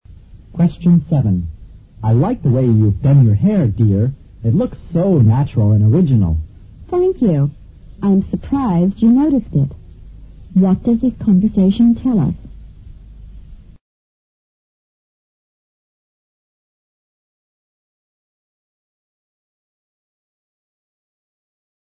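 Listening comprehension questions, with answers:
Q: What does the conversation tell us?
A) The husband hasn't told the truth.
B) The wife is annoyed at her husband's complaint.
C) The husband is not usually so observant.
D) The wife is going to the hairdresser's.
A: The husband is not usually so observant.

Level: 六级

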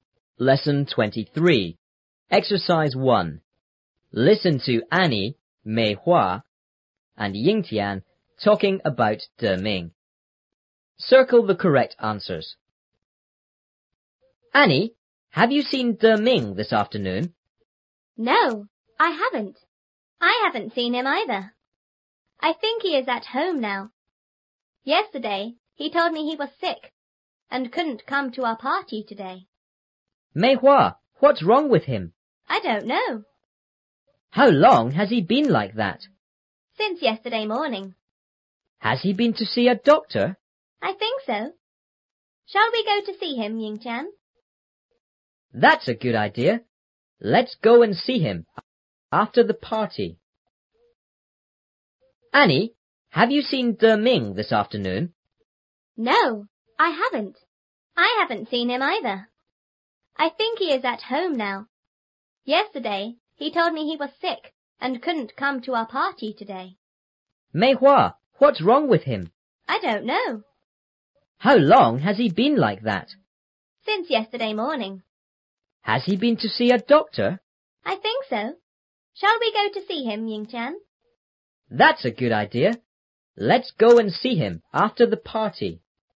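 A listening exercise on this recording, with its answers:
Circle the correct answers.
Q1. What are the boys and girls doing?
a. They are having a class.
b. They are playing in the playground.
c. They are having a party.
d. They are waiting for a bus.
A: They are having a party.

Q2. Has Annie seen Deming this afternoon?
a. Yes,she has.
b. No,she hasn't.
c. We don't know.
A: No,she hasn't.

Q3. Where does Meihua think Deming is?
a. At home.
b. In hospital.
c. At the party.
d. At school.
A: At home.

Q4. How long has Deming been ill?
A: Since yesterday morning.

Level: 初中英语广州版3B

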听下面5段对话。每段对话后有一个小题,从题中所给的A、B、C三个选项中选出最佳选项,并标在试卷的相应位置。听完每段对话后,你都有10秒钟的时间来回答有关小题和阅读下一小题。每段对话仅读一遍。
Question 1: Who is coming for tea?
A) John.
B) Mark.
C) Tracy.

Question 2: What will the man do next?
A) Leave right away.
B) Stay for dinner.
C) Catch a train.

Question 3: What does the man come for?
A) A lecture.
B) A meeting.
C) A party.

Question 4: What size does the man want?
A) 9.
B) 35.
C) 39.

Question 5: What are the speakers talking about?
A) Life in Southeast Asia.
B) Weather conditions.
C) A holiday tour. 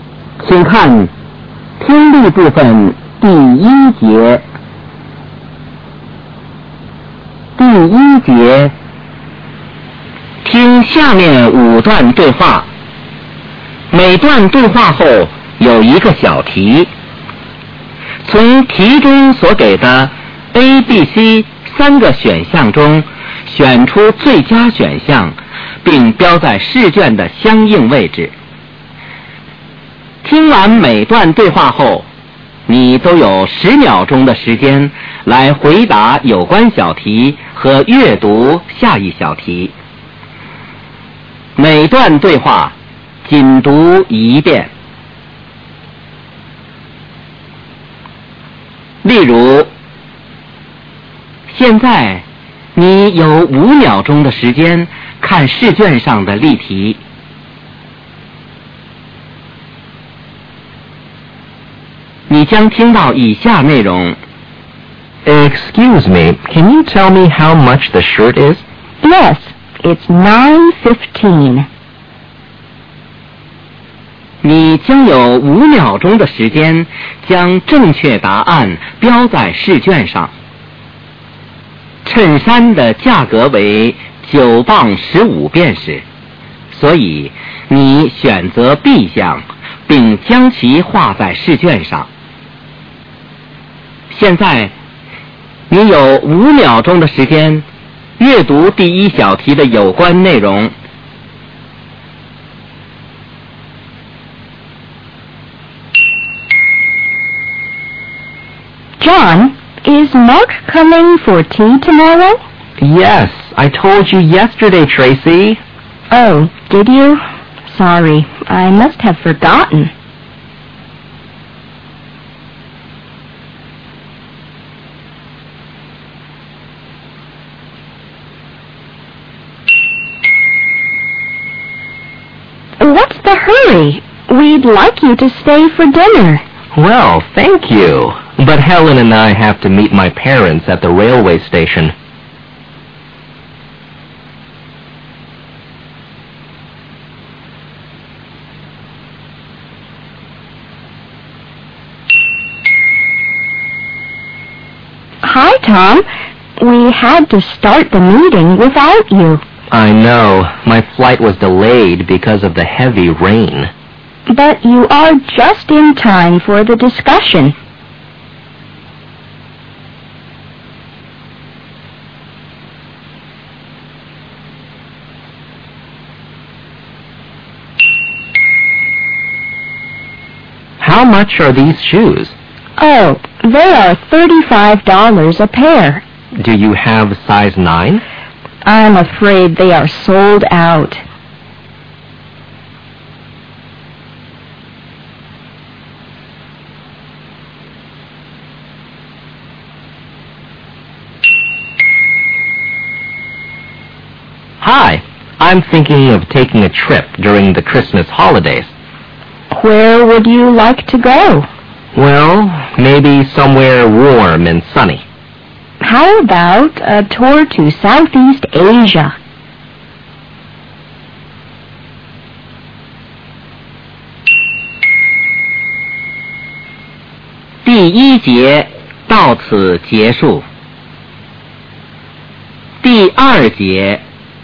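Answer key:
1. Mark.
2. Leave right away.
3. A meeting.
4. 9.
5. A holiday tour.

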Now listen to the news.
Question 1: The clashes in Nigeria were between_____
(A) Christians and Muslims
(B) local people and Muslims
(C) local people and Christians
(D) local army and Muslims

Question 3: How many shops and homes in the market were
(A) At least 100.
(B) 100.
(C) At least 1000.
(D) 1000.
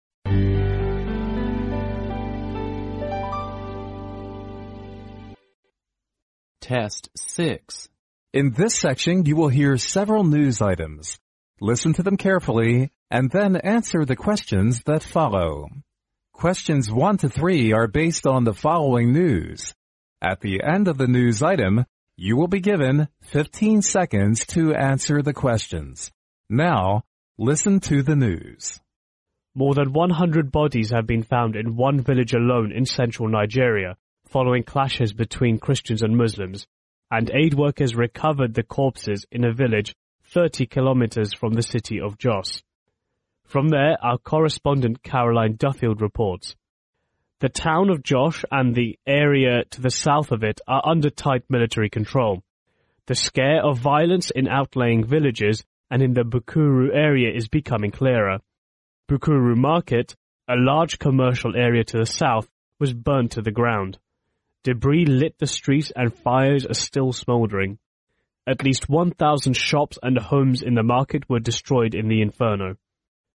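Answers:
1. Christians and Muslims
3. At least 1000.

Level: 专业四级

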